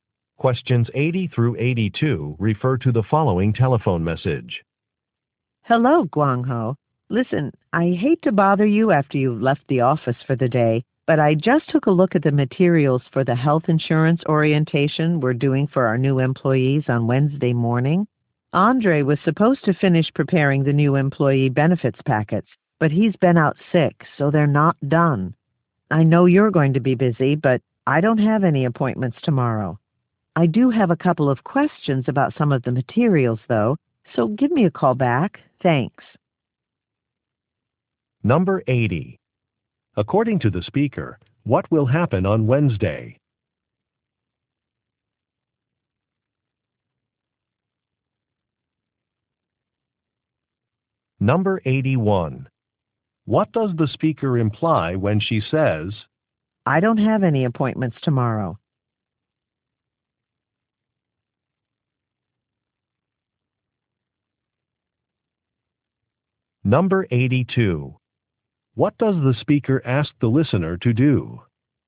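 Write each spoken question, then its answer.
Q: According to the speaker, what will happen on Wednesday?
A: A health insurance orientation for new employees

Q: What does the speaker imply when she says, I don't have any appointments tomorrow?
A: She can prepare the benefits packets

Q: What does the speaker ask the listener to do?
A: Call her back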